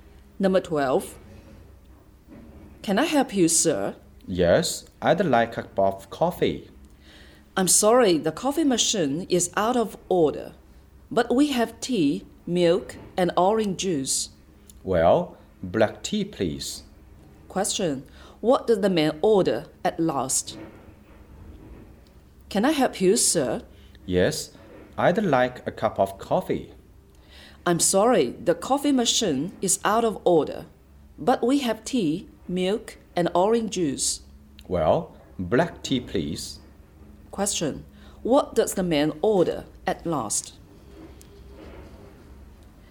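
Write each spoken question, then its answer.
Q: What does the man order at last?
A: Black tea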